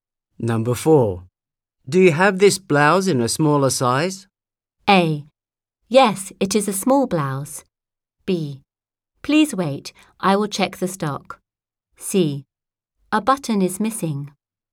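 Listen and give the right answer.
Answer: B: Please wait, I will check the stock.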